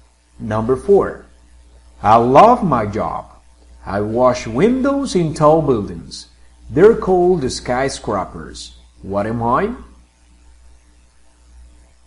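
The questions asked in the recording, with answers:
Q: What am I?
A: a window washer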